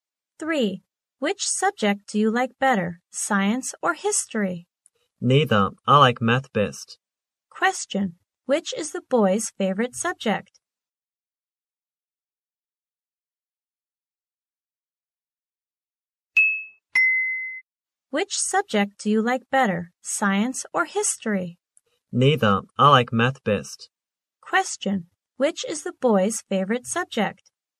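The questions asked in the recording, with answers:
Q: Which is the boy's favorite subject?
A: Math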